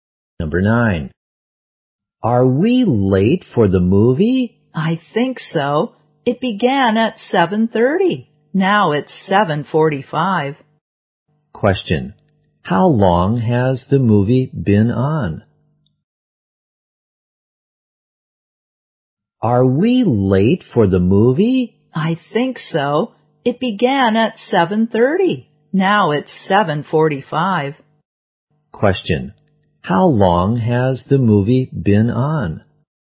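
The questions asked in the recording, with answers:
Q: How long has the movie been on?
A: 15 minutes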